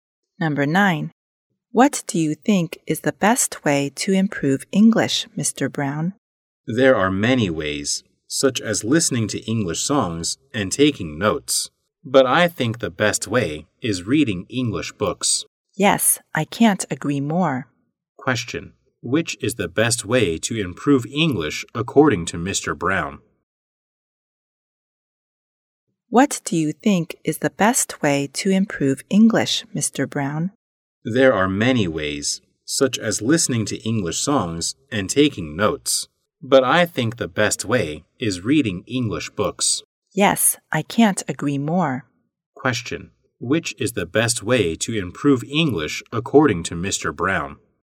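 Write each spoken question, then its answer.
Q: Which is the best way to improve English according to Mr.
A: Reading English books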